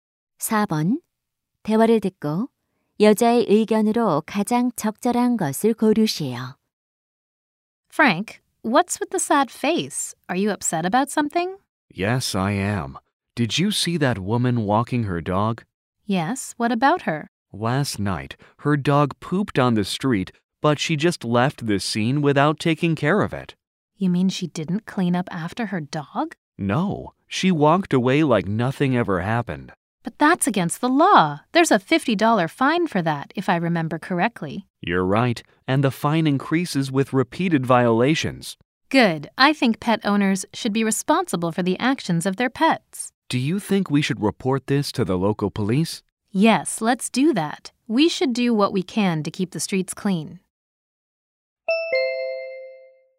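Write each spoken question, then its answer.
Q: 대화를 듣고 여자의 의견으로 가장 적절한 것을 고르시오.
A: 반려동물 주인은 자기 반려동물의 행동에 책임을 져야 한다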